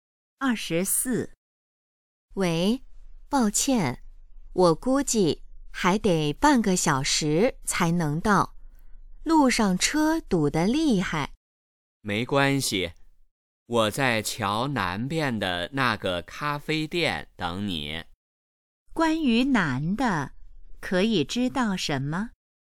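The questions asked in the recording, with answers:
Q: 关于南的,可以知道什么?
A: 路上堵车,还得半小时才到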